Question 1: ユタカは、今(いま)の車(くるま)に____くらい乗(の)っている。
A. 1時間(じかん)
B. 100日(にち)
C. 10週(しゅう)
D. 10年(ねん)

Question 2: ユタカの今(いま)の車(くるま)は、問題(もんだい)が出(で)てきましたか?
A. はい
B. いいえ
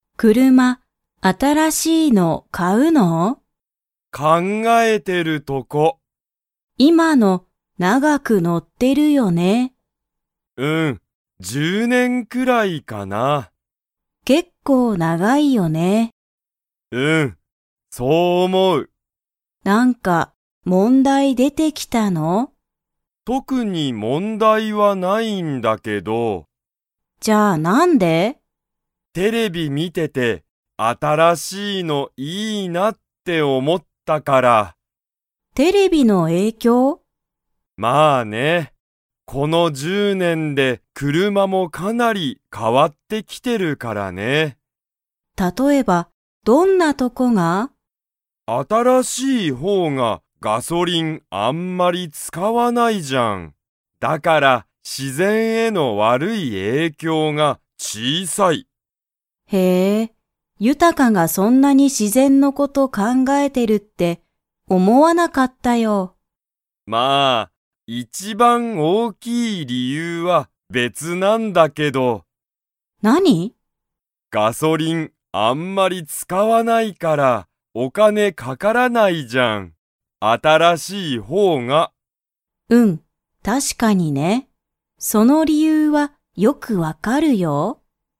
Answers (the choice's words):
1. 10年(ねん)
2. いいえ

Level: Level 2